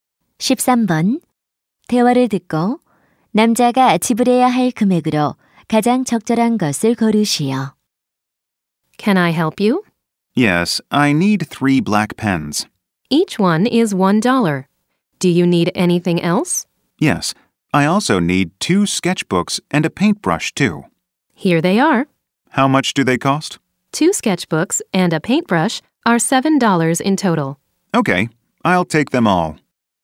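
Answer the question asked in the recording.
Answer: 10달러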